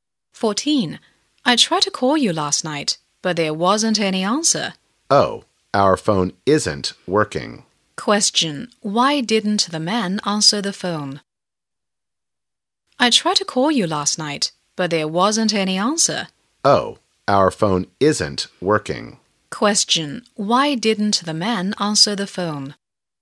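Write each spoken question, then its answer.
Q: Why didn't the man answer the phone?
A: Because his phone wasn't working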